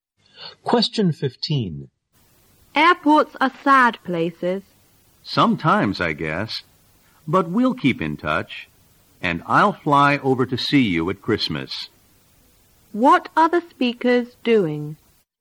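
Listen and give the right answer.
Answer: Saying goodbye at an airport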